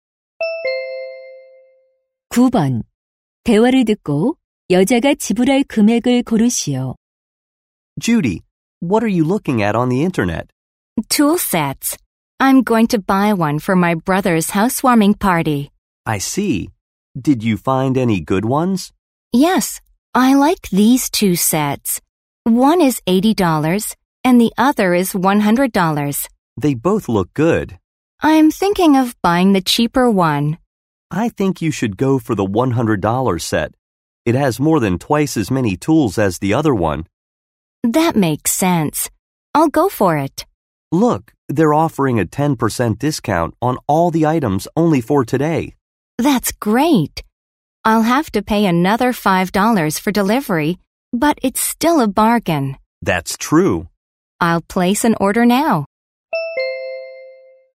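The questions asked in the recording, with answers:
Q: 대화를 듣고 여자가 지불할 금액을 고르시오.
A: $95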